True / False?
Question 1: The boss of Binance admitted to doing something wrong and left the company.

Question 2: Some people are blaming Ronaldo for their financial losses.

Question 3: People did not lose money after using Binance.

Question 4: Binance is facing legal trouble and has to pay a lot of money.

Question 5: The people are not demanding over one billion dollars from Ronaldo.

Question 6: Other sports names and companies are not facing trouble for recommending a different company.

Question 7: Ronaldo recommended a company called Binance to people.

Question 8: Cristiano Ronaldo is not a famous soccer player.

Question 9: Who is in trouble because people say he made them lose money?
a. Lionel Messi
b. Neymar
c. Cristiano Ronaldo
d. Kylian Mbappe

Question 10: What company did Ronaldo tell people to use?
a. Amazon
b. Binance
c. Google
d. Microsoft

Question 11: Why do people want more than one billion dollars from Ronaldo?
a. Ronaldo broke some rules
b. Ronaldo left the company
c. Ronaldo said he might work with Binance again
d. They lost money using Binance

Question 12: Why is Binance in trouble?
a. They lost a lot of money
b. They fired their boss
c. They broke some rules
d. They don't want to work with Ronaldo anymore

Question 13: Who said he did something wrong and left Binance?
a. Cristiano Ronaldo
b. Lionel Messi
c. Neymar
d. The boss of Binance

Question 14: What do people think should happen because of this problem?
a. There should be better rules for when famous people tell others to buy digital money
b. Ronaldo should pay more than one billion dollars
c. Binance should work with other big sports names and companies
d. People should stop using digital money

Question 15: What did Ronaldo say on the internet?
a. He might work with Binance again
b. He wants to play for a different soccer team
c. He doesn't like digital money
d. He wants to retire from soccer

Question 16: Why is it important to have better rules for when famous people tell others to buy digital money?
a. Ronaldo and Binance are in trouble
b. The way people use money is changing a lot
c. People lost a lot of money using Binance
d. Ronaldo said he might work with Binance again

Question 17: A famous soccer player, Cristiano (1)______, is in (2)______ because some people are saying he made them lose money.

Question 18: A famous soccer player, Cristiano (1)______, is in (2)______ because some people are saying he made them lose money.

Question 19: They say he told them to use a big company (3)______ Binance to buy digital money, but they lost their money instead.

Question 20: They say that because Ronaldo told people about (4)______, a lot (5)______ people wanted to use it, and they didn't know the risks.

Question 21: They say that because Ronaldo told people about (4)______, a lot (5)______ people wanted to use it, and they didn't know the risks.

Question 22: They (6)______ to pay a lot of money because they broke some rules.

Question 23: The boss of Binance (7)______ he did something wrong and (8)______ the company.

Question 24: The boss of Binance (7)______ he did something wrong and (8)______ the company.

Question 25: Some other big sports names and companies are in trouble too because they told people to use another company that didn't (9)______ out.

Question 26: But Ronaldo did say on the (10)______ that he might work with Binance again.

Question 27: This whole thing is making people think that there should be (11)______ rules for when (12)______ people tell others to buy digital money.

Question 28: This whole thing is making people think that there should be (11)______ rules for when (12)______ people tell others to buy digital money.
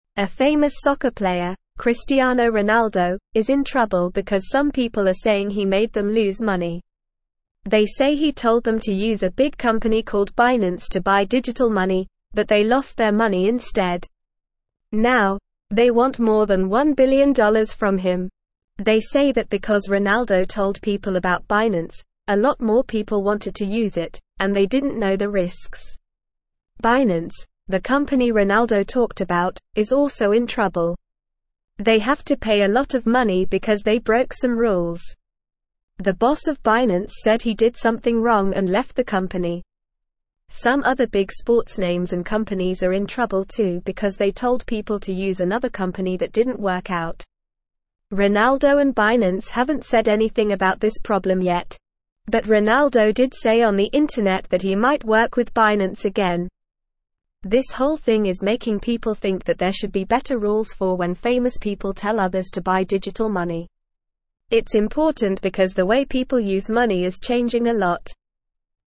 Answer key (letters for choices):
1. True
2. True
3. False
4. True
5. False
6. False
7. True
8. False
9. c
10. b
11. d
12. c
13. d
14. a
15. a
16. b
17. Ronaldo
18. trouble
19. called
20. Binance
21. more
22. have
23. said
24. left
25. work
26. internet
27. better
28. famous

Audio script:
A famous soccer player, Cristiano Ronaldo, is in trouble because some people are saying he made them lose money. They say he told them to use a big company called Binance to buy digital money, but they lost their money instead. Now, they want more than one billion dollars from him. They say that because Ronaldo told people about Binance, a lot more people wanted to use it, and they didn't know the risks.
Binance, the company Ronaldo talked about, is also in trouble. They have to pay a lot of money because they broke some rules. The boss of Binance said he did something wrong and left the company. Some other big sports names and companies are in trouble too because they told people to use another company that didn't work out.
Ronaldo and Binance haven't said anything about this problem yet. But Ronaldo did say on the internet that he might work with Binance again. This whole thing is making people think that there should be better rules for when famous people tell others to buy digital money. It's important because the way people use money is changing a lot.

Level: Level 2